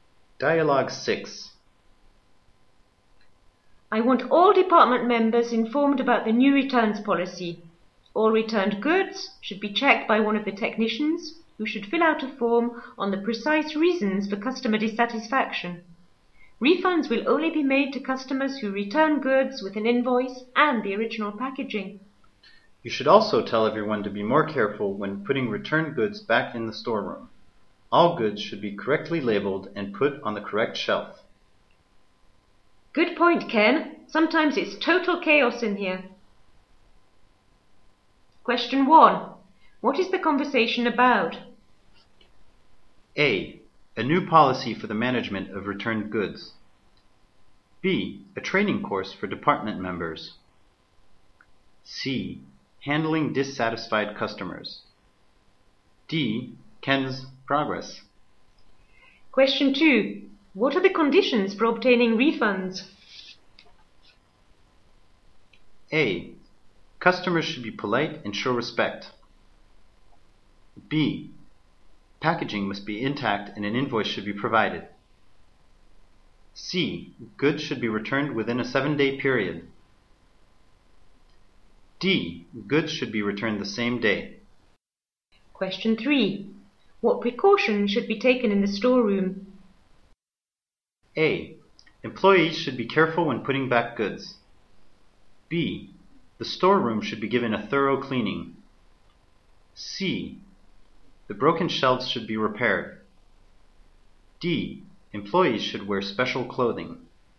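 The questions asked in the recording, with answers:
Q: What is the conversation about?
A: A: A new policy for the management of returned goods.

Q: What are the conditions for obtaining refunds?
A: B: Packaging must be intact and an invoice should be provided.

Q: What precautions should be taken in the storeroom?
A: A: Employees should be careful when putting back goods.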